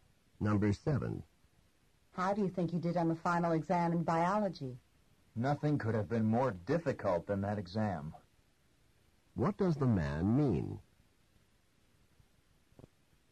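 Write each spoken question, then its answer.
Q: What does the man mean?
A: The exam was extremely difficult.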